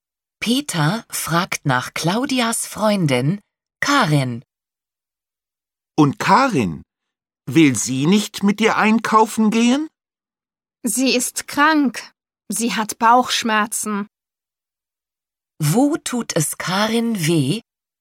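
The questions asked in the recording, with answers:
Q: Wo tut es Karin weh?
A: Am Bauch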